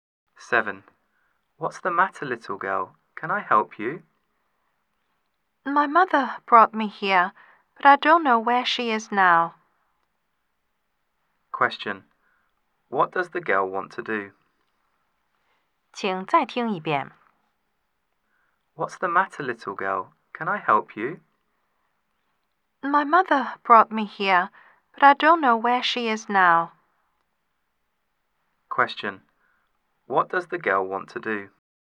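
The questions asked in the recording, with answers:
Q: Question. What does the girl want to do?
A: To find her mother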